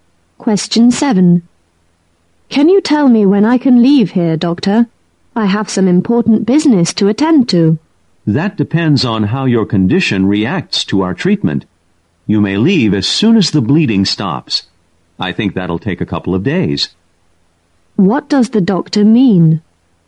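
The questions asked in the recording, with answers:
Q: What does the doctor mean?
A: The patient can leave once the bleeding stops, probably in a couple of days.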